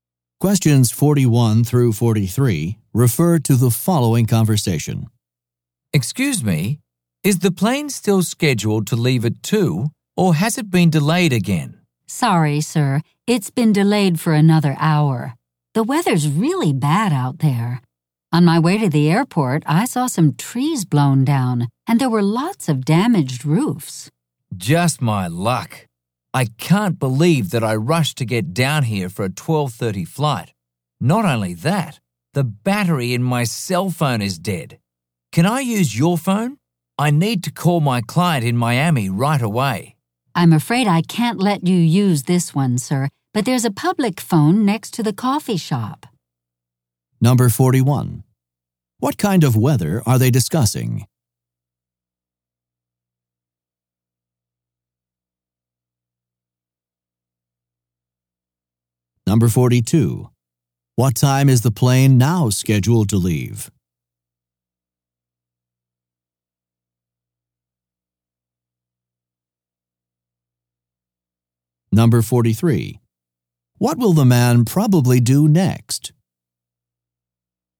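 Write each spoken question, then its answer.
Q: What kind of weather are they discussing?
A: Stormy, very windy weather

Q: What time is the plane now scheduled to leave?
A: At 3 o'clock

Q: What will the man probably do next?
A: Use the public phone near the coffee shop to call his client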